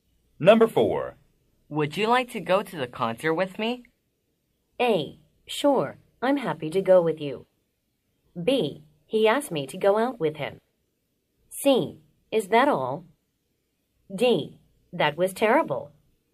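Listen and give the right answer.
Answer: A: Sure, I'm happy to go with you.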